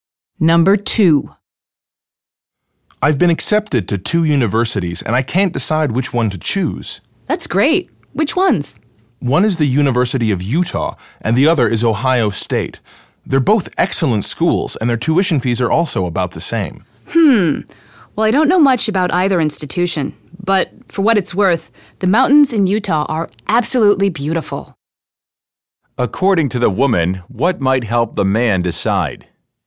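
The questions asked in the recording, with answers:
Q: According to the woman, what might help the man decide?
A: The beautiful mountains in Utah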